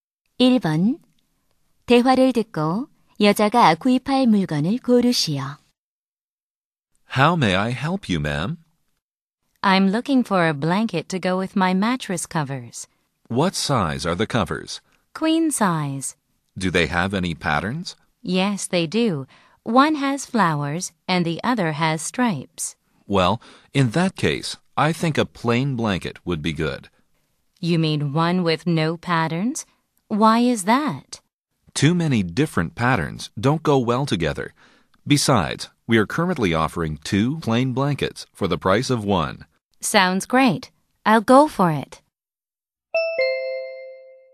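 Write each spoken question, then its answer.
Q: 대화를 듣고 여자가 구입할 물건을 고르시오.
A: 무늬 없는 퀸 사이즈 담요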